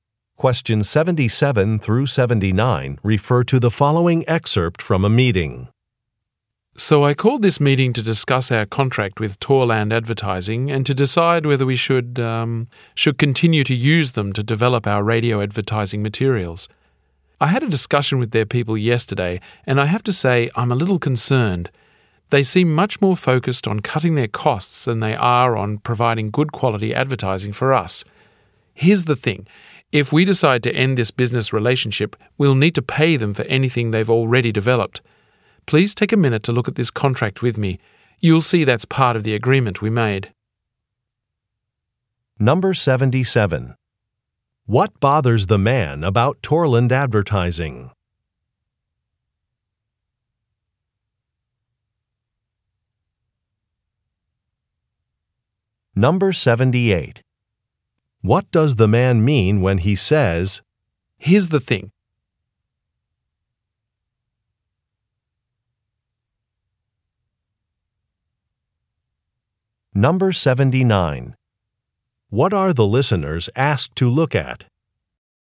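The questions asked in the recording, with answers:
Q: What bothers the man about Torland Advertising?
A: They focus more on cutting costs than on providing good quality advertising.

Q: What are the listeners asked to look at?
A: A contract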